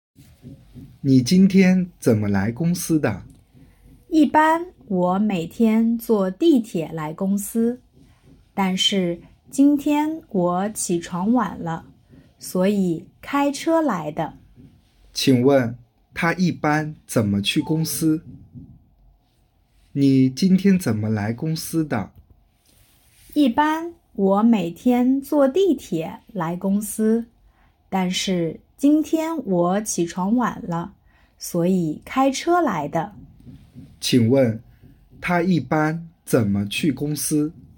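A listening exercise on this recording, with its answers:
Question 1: 他一般 怎么 去公司?Tā yībān zěnme qù gōngsī?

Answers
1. 坐地铁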